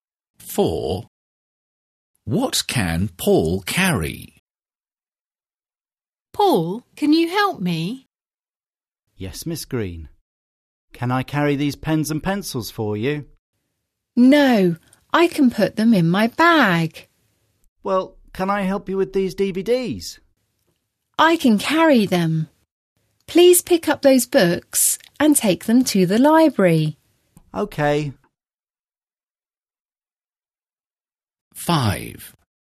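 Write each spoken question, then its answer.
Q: What can Paul carry?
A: The books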